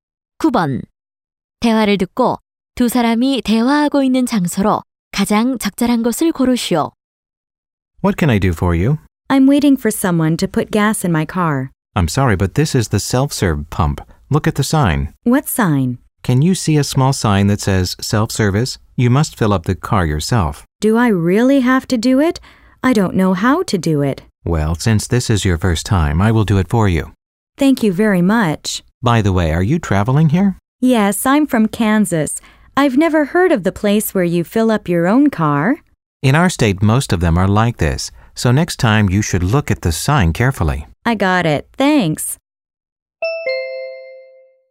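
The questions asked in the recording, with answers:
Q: 대화를 듣고 두 사람이 대화하고 있는 장소로 가장 적절한 곳을 고르시오.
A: 주유소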